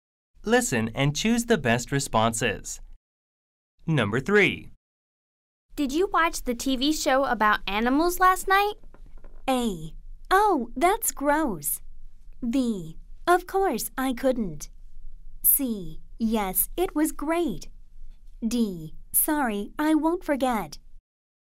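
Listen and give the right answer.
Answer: C: Yes, it was great.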